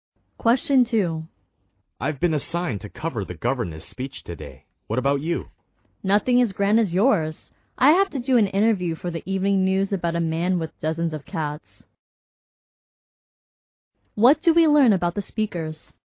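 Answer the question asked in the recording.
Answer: They are both reporters covering different stories.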